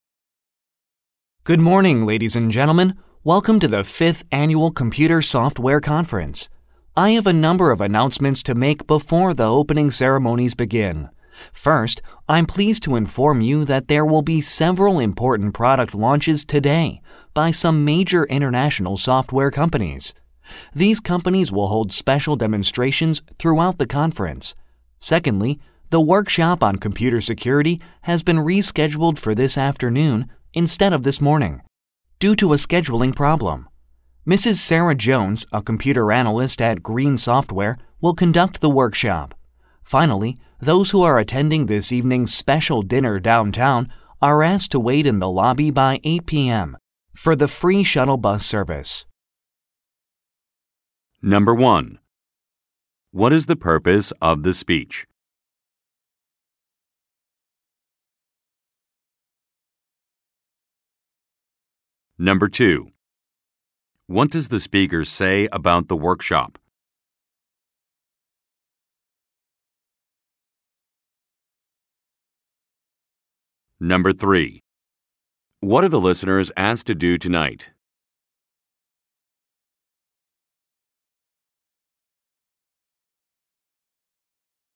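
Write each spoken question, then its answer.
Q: What is the purpose of the speech?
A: To make announcements at a software conference

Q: What does the speaker say about the workshop?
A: It has been rescheduled for this afternoon

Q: What are the listeners asked to do tonight?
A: Wait in the lobby by 8 p.m. for the free shuttle bus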